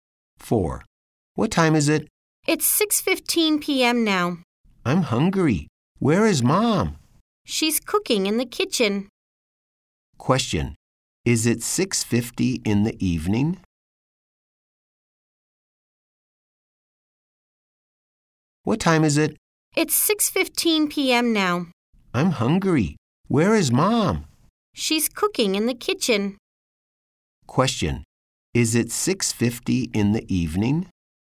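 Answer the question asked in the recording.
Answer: No, it's 6:15 p.m.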